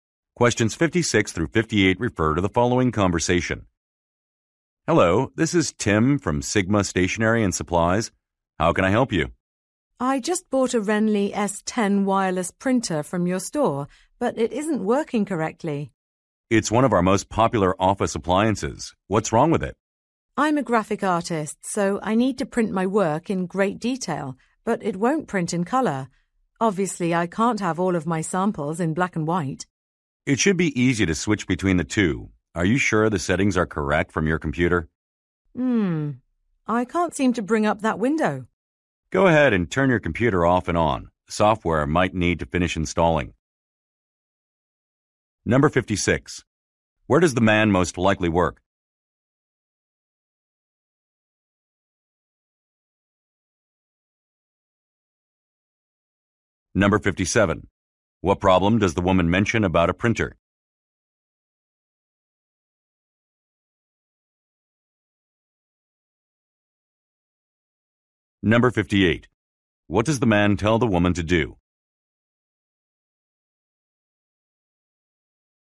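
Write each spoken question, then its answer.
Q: Where does the man most likely work?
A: At a stationery and office supply store.

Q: What problem does the woman mention about a printer?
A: It won't print in color.

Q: What does the man tell the woman to do?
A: Restart her computer.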